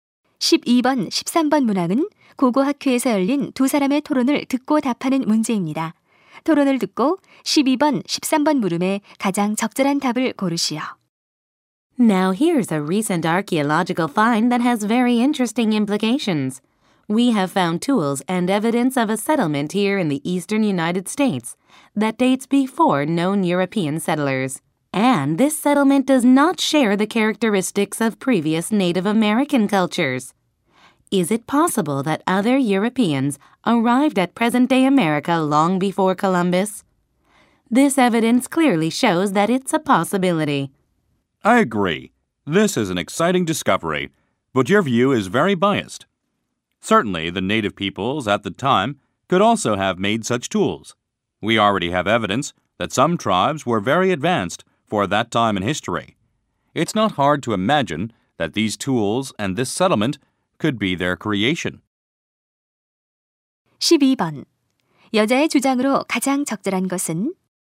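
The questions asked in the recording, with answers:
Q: 여자의 주장으로 가장 적절한 것은?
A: 그 도구와 정착지는 당시 원주민들이 만들었을 수도 있다.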